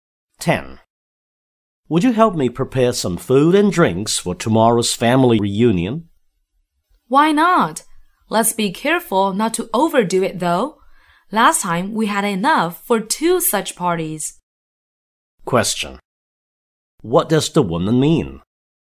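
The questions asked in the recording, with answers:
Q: What does the woman mean?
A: They shouldn't prepare too much food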